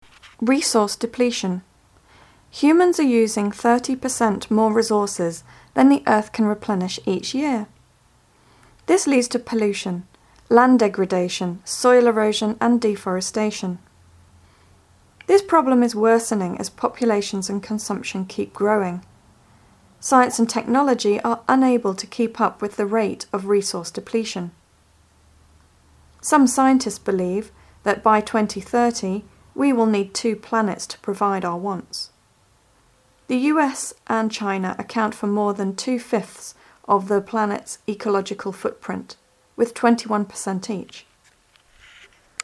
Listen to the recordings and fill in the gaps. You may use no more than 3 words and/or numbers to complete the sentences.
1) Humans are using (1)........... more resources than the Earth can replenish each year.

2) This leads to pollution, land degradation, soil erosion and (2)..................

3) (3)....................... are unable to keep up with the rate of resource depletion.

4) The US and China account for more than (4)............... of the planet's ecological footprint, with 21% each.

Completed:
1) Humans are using 30% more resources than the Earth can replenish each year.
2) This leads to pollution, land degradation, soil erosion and deforestation
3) Science and technology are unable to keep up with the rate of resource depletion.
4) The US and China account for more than two-fifths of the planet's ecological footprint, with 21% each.